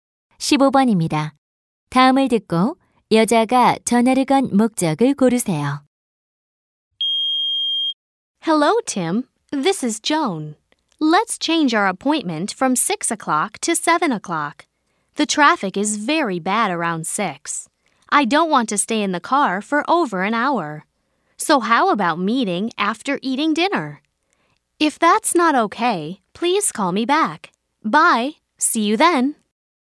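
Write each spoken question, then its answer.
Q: 다음을 듣고 여자가 전화를 건 목적을 고르세요.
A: 약속 시간을 6시에서 7시로 바꾸려고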